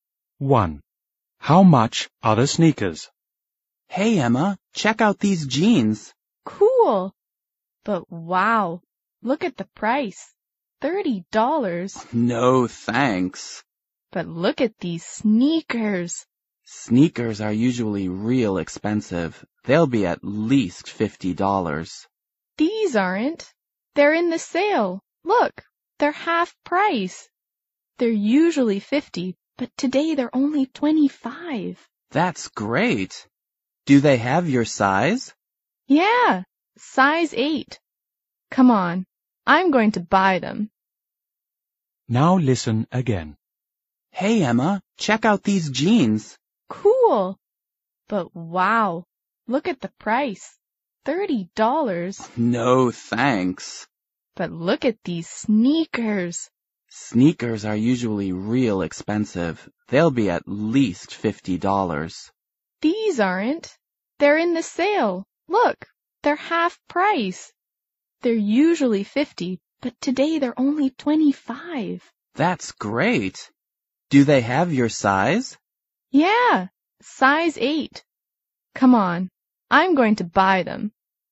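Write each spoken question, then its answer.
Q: How much are the sneakers?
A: $25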